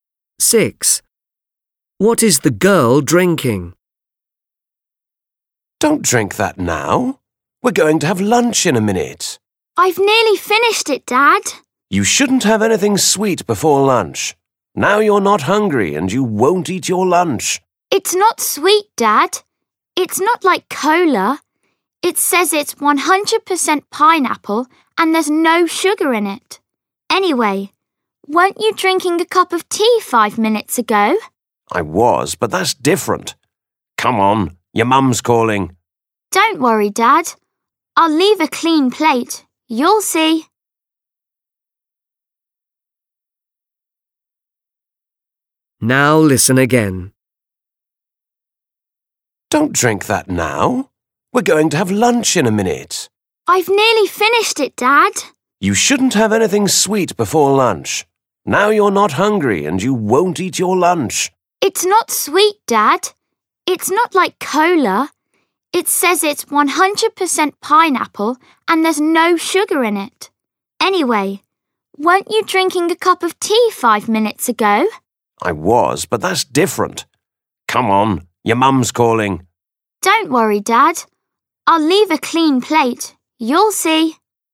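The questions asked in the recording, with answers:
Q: What is the girl drinking?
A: Pineapple juice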